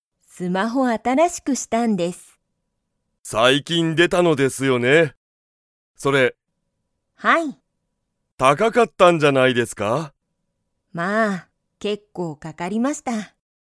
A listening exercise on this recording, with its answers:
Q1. 木戸(きど)さんのスマホは、安(やす)かったですか?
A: いいえ

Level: Level 1